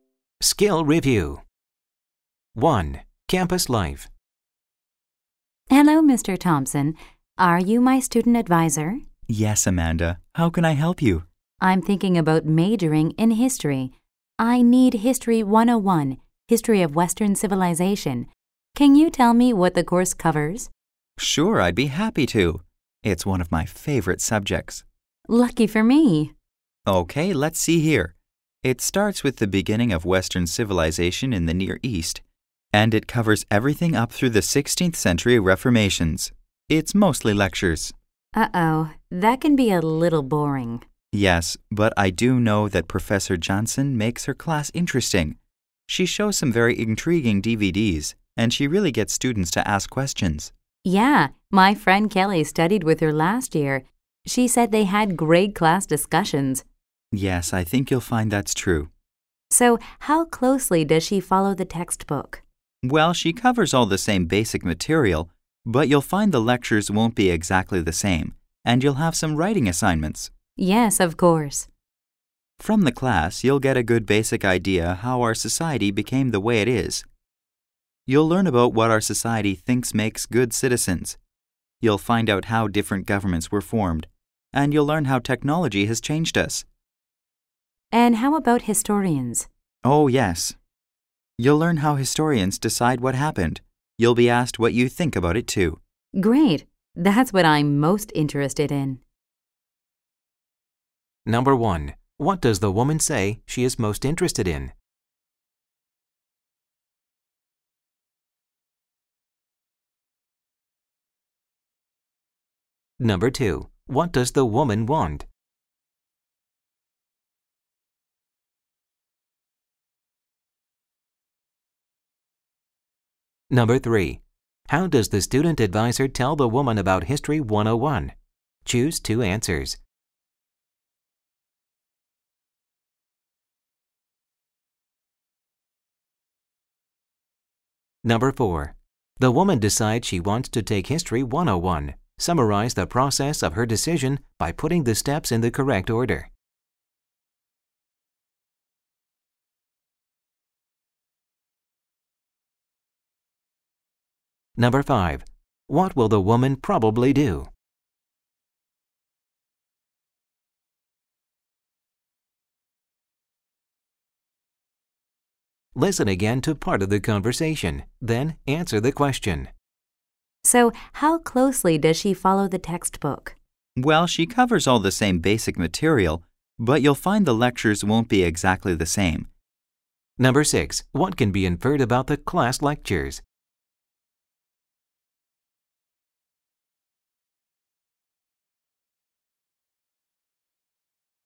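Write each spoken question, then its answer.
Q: What does the woman say she is most interested in?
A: How historians decide what happened

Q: What does the woman want?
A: Information about what the History 101 course covers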